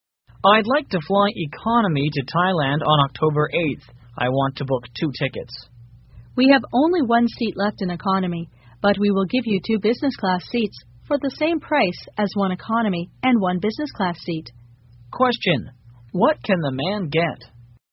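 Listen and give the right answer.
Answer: Two business class seats for the price of one economy and one business class seat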